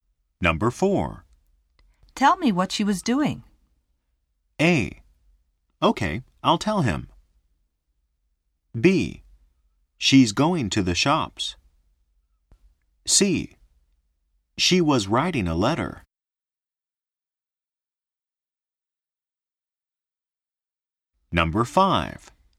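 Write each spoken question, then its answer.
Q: Tell me what she was doing.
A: C: She was writing a letter.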